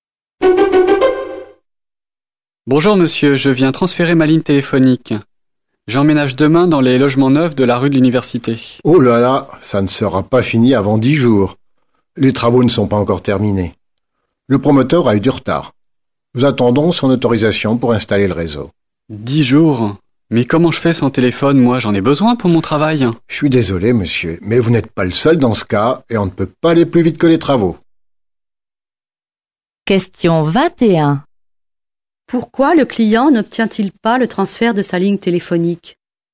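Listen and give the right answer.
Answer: Les travaux du logement ne sont pas terminés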